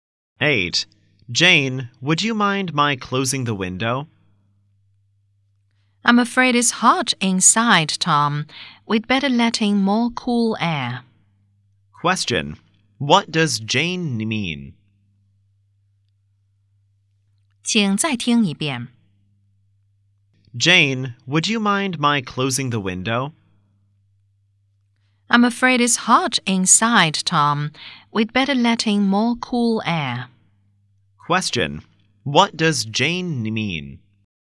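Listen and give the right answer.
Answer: She doesn't want the window closed because it's hot inside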